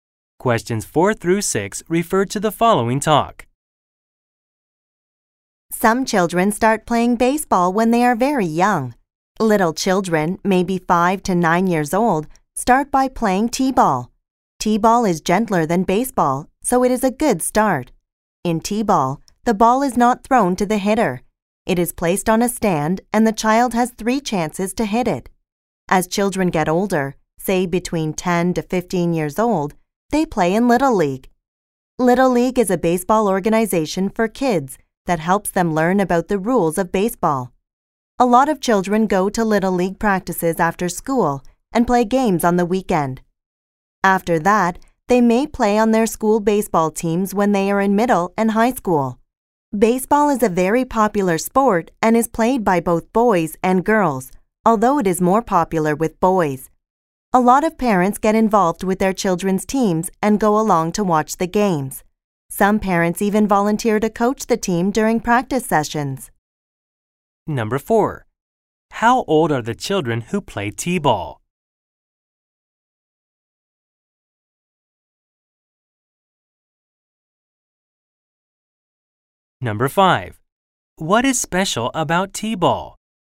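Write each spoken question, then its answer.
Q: How old are the children who play t-ball?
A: About 5 to 9 years old

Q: What is special about t-ball?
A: The ball is placed on a stand instead of being thrown to the hitter.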